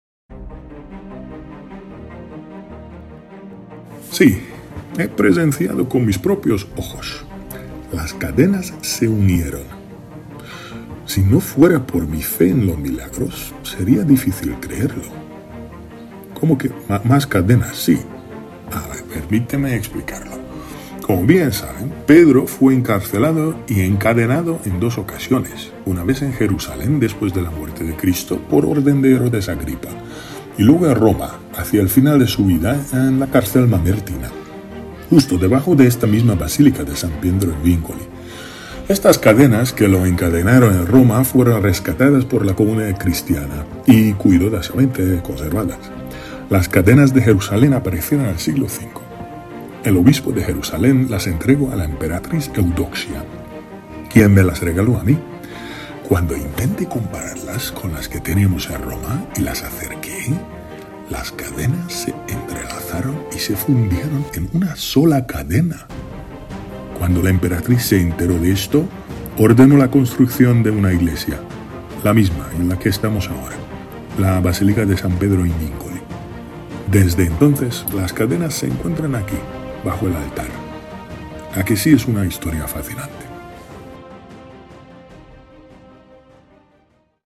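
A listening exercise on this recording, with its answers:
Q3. ¿A quién pertenecieron las cadenas debajo del altar?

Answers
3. A San Pedro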